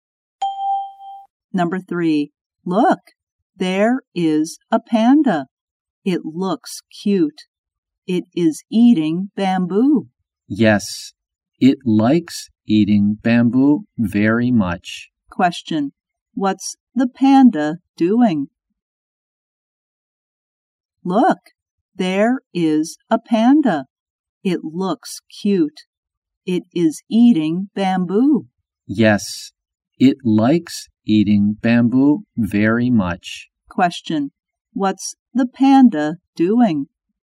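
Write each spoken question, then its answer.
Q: Question, what's the panda doing?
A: Eating bamboo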